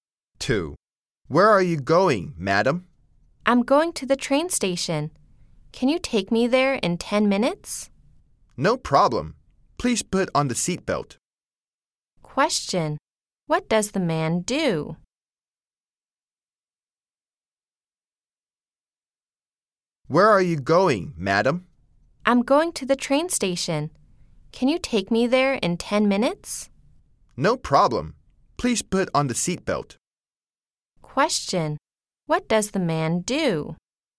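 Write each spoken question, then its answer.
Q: Question.What does the man do?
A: He is a taxi driver.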